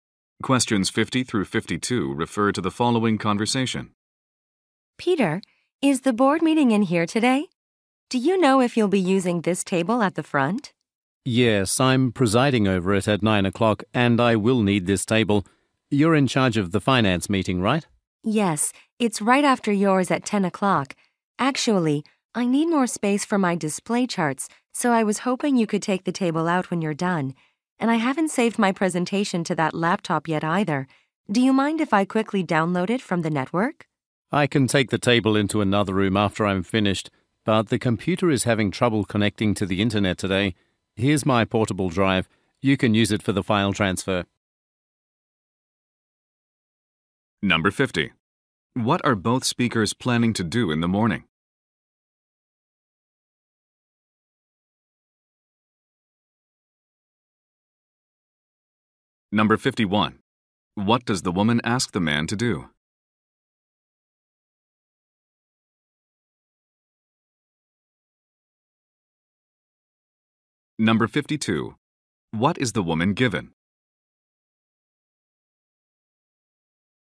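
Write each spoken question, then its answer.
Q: What are both speakers planning to do in the morning?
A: Lead meetings.

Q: What does the woman ask the man to do?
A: Take the table out after his meeting.

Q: What is the woman given?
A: A portable drive.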